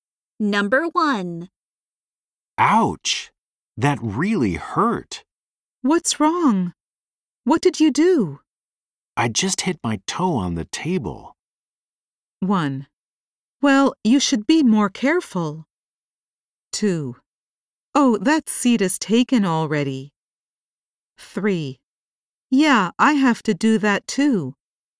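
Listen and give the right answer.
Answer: 1: Well, you should be more careful.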